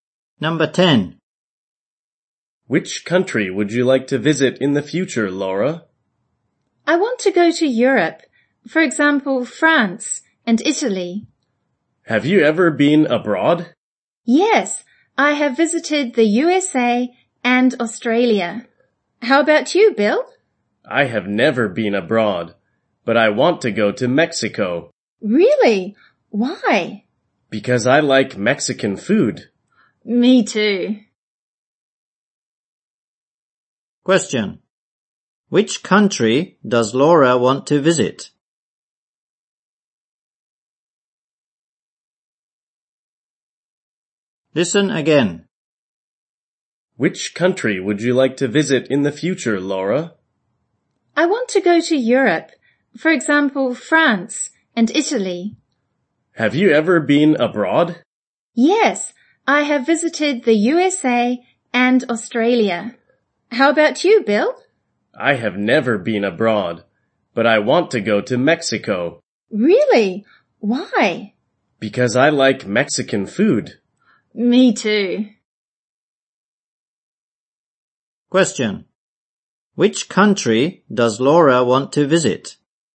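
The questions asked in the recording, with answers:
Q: Which country does Laura want to visit?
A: France and Italy.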